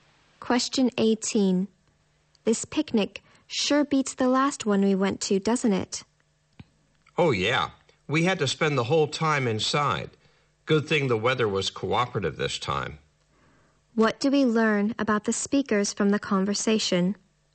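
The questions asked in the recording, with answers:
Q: What do we learn about the speakers from the conversation?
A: The weather was bad at their last picnic, but it is good this time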